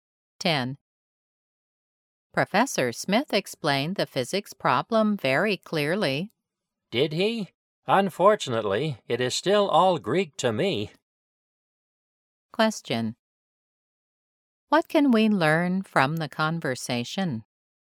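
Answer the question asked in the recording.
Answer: The woman still doesn't understand the physics problem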